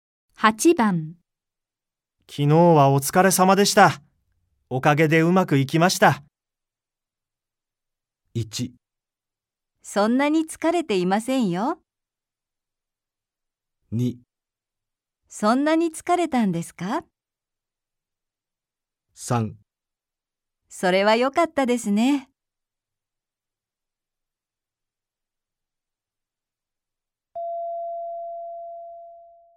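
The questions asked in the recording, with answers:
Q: 昨日はお疲れ様でした。おかげでうまくいきました。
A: 3: それは良かったですね。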